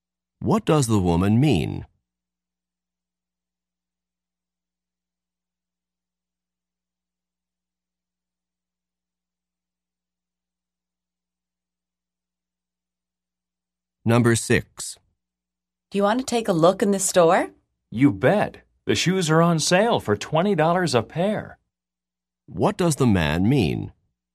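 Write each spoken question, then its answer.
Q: What does the man mean?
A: Yes, he wants to look because shoes are on sale for $20 a pair.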